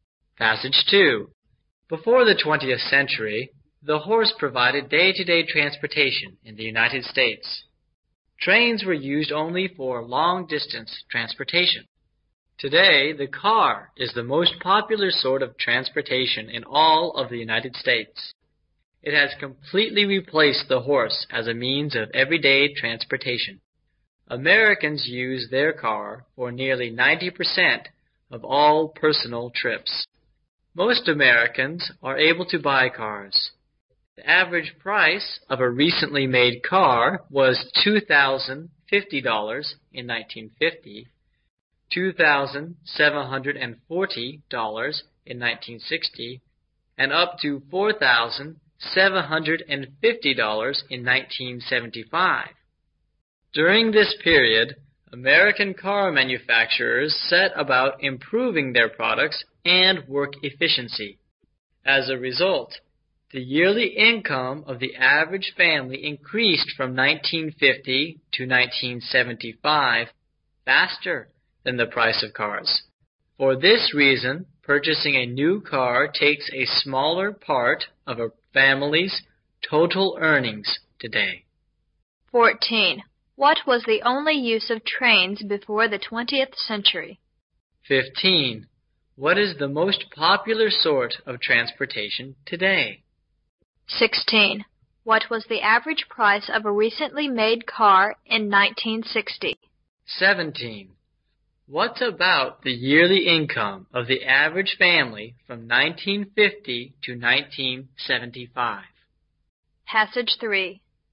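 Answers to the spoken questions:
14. Long-distance transportation
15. The car
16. $2,740
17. It increased faster than the price of cars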